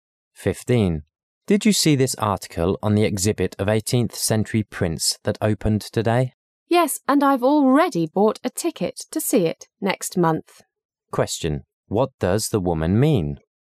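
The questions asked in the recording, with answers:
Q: What does the woman mean?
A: She plans to see the exhibit next month.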